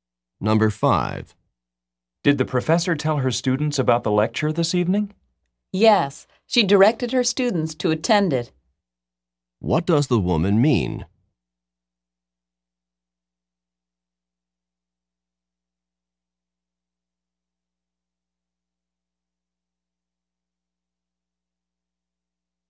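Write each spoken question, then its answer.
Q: What does the woman mean?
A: The professor told her students to attend the lecture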